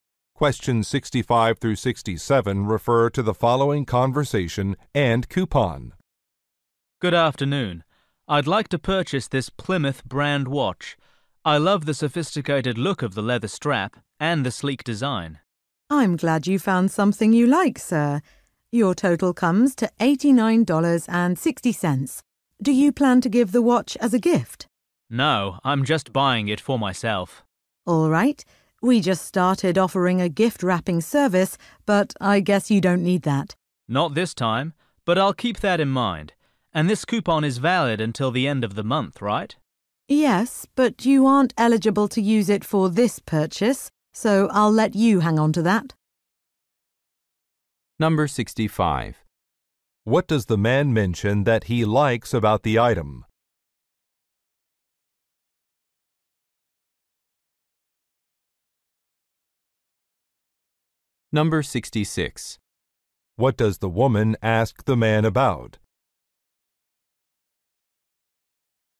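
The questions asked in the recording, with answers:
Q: What does the man mention that he likes about the item?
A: The leather strap and the sleek design

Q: What does the woman ask the man about?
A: Whether the watch is a gift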